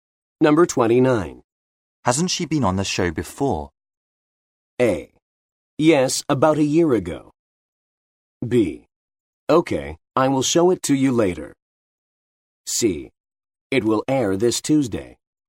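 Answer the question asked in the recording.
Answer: A: Yes, about a year ago.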